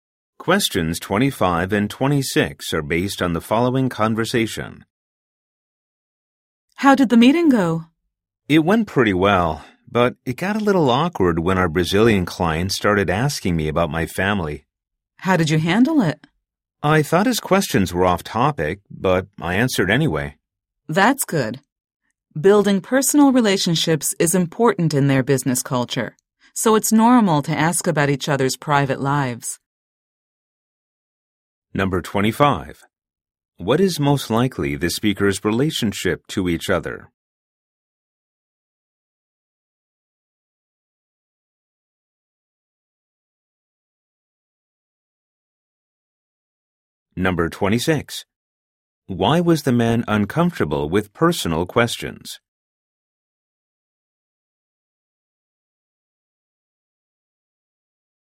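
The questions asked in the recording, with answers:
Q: Why was the man uncomfortable with personal questions?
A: He thought they were off topic for a business meeting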